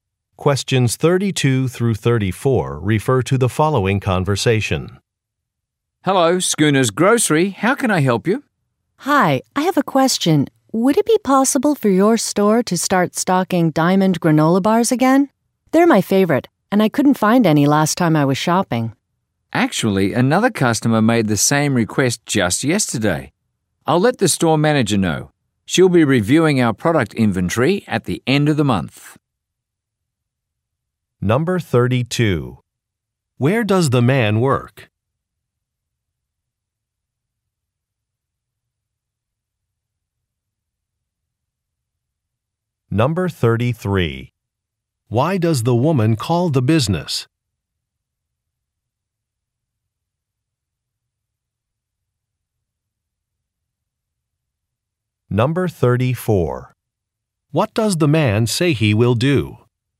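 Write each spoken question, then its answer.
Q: Where does the man work?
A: At a grocery store

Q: Why does the woman call the business?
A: To ask the store to stock diamond granola bars again

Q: What does the man say he will do?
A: Tell the store manager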